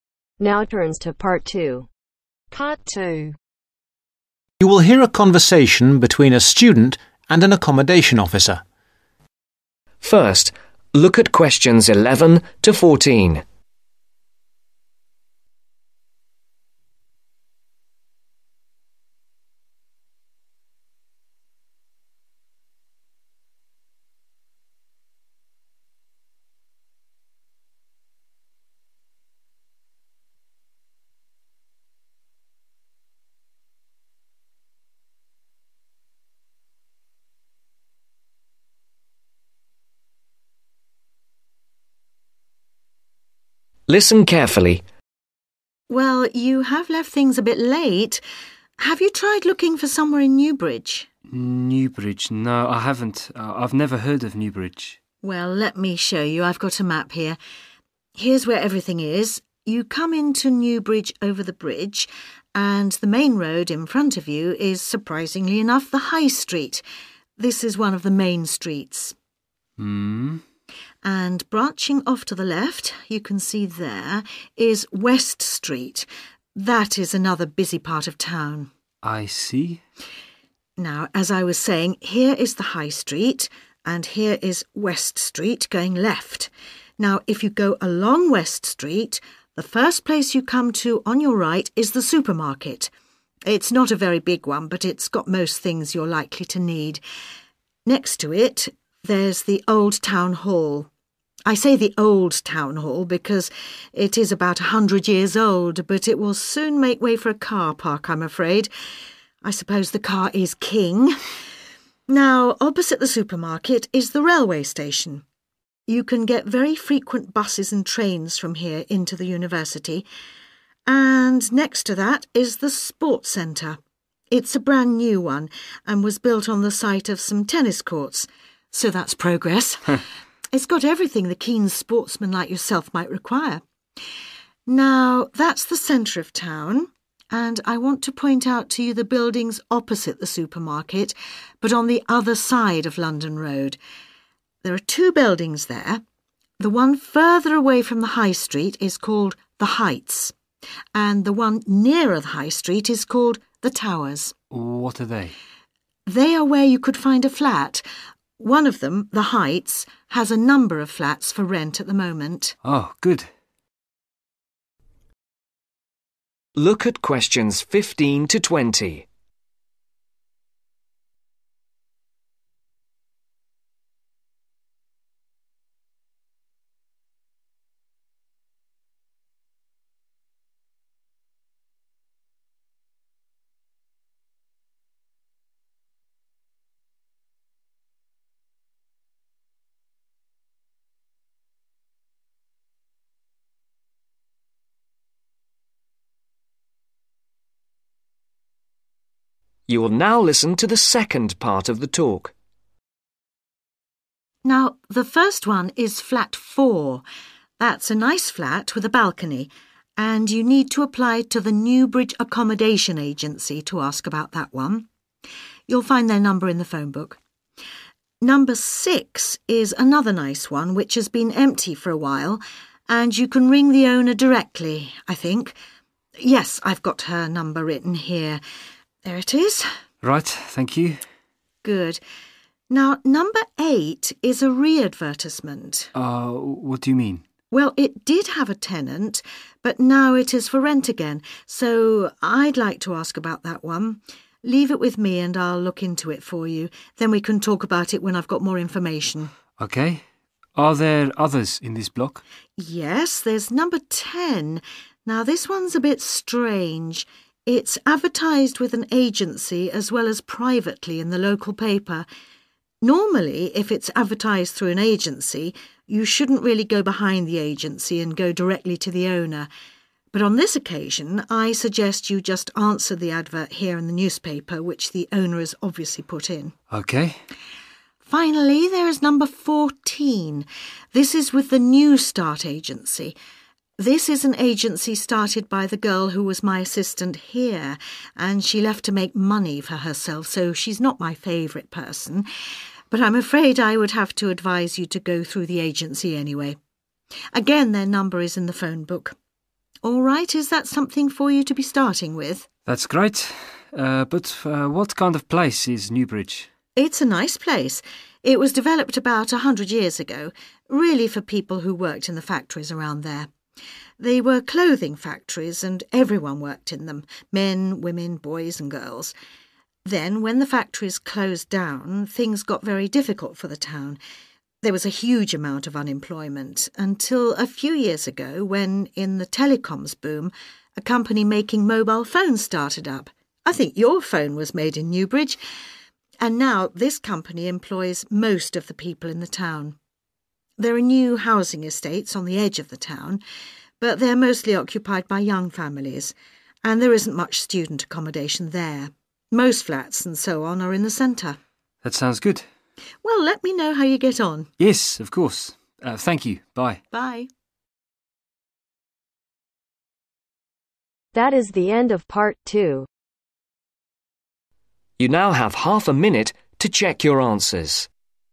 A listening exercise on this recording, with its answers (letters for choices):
Write the appropriate letters A-C against the flat numbers.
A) apply to an agency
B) deal through the accommodation officer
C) apply directly to the owner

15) Flat 6 ............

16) Flat 8 ............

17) Flat 10 ............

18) Flat 14 ............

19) The biggest employers in New bridge used to be (19)............ .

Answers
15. C
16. B
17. C
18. A
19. CLOTHING FACTORIES